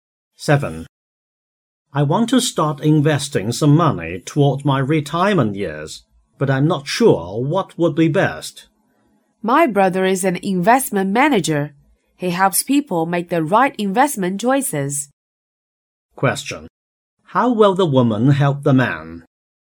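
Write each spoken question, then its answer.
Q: How will the woman help the man?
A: By referring him to her brother, an investment manager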